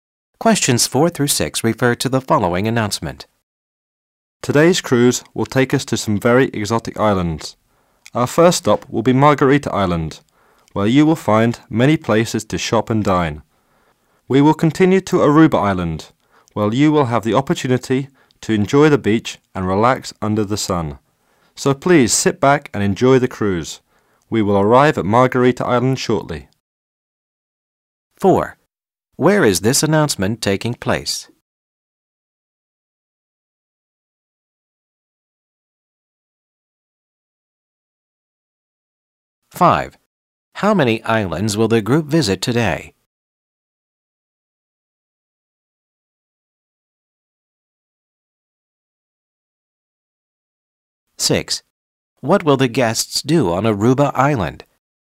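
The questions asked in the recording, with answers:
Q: Where is this announcement taking place?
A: On a cruise ship

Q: How many islands will the group visit today?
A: Two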